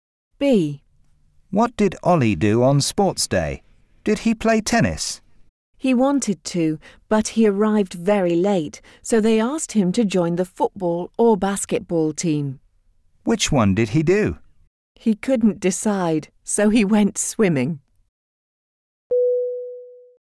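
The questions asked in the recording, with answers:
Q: What did Ollie do on sports day?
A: He went swimming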